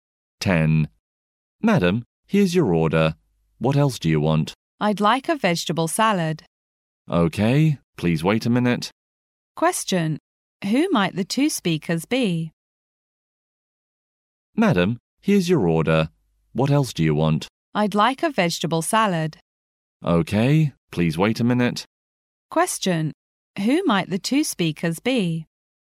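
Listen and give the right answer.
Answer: A waiter and a customer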